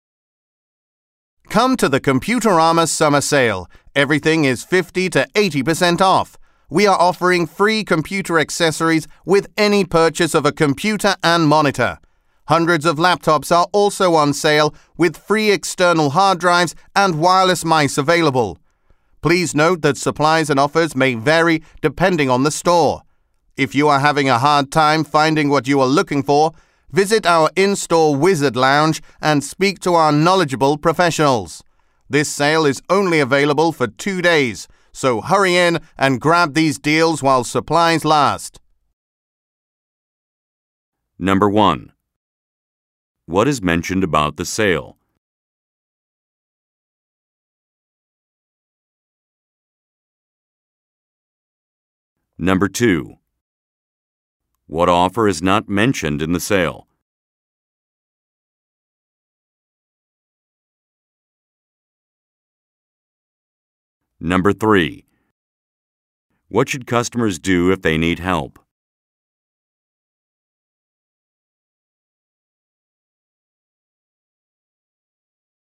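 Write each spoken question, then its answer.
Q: What should customers do if they need help?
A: Visit the in-store Wizard Lounge and speak to the professionals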